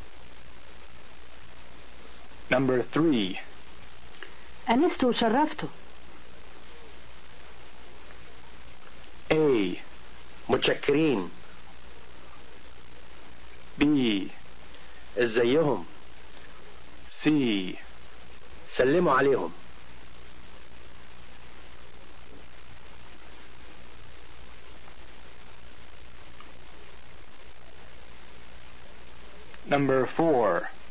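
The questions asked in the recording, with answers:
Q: أنست وشرفته.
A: A: متشكرين.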